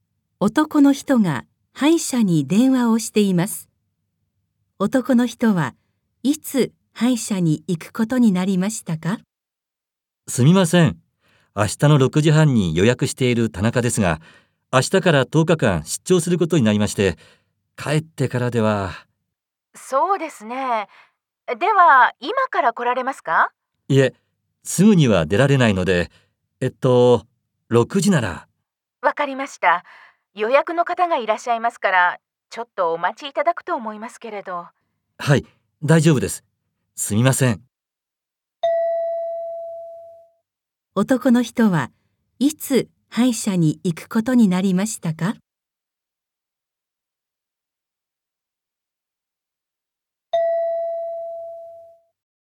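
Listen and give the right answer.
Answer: 今日の6時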